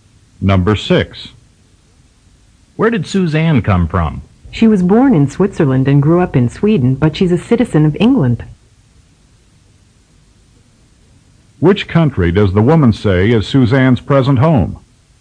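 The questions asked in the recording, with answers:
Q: Which country does the woman say is Suzanne's present home?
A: England.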